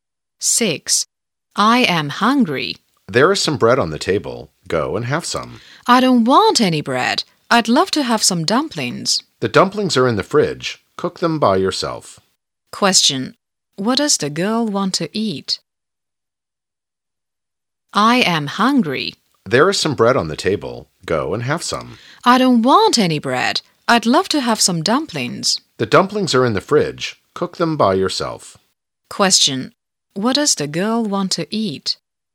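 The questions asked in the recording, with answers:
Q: What does the girl want to eat?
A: Dumplings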